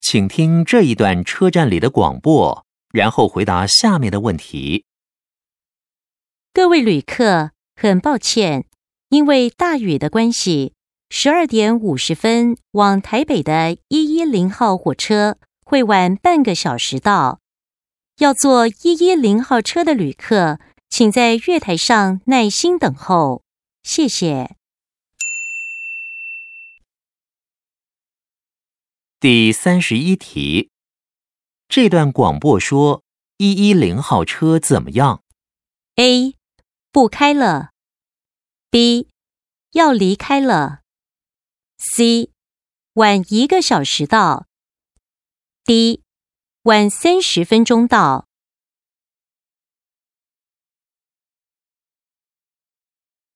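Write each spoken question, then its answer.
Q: 这段广播说110号车怎么样?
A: D: 晚30分钟到。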